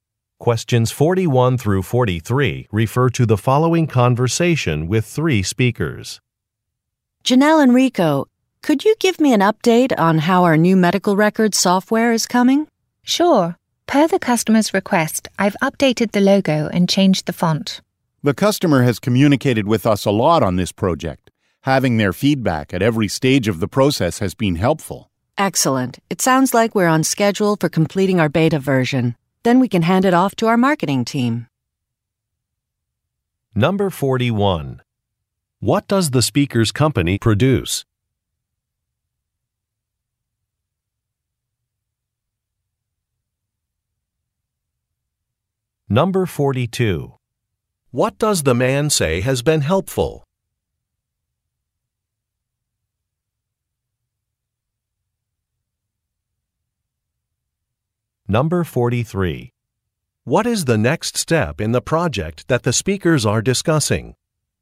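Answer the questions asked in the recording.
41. Software
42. The customer's feedback at every stage
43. Completing the beta version and handing it to marketing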